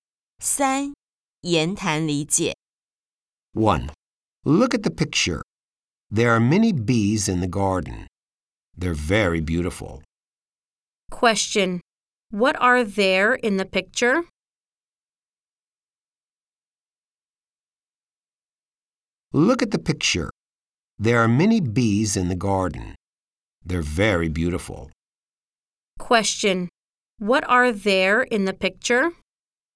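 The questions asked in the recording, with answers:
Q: What are there in the picture?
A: Many bees.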